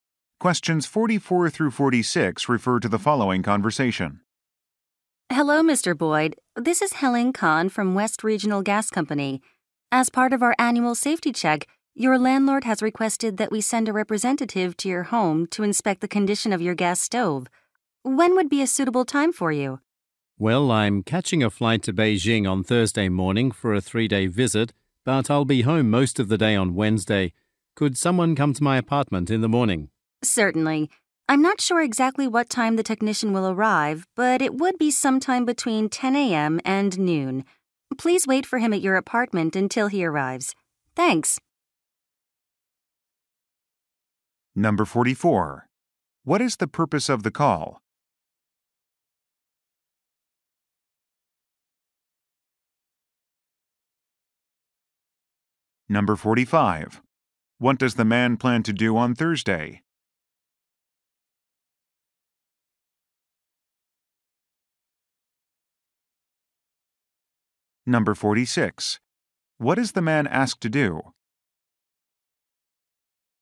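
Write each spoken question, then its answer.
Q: What is the purpose of the call?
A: To arrange a gas stove safety inspection.

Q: What does the man plan to do on Thursday?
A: Fly to Beijing.

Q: What is the man asked to do?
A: Wait at his apartment for the technician.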